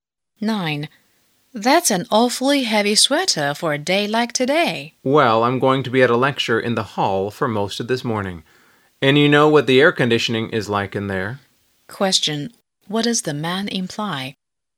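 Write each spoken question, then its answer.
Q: What does the man imply?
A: The lecture hall will be cold because of the air conditioning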